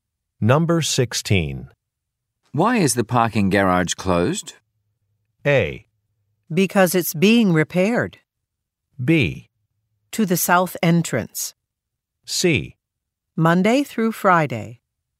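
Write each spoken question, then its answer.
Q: Why is the parking garage closed?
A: A: Because it's being repaired.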